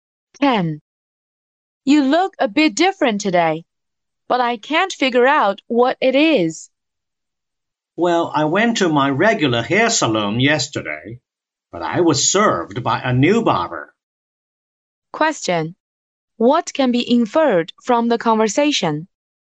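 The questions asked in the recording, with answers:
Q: What can be inferred from the conversation?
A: Ken got a haircut from a new barber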